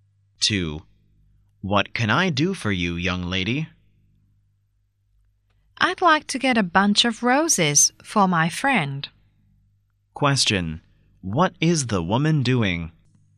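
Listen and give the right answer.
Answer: Buying roses for her friend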